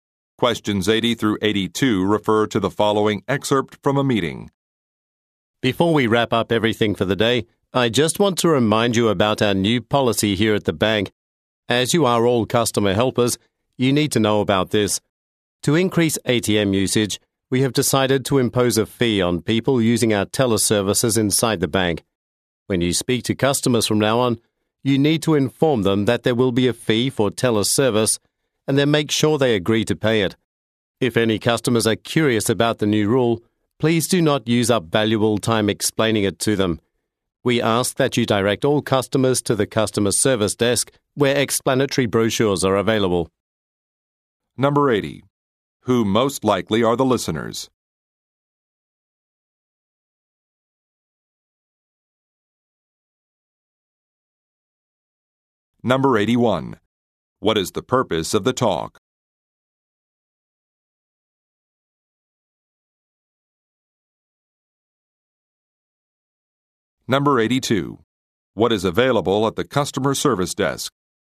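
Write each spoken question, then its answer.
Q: Who most likely are the listeners?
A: Bank customer service staff

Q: What is the purpose of the talk?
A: To announce a new fee for teller services

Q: What is available at the customer service desk?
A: Explanatory brochures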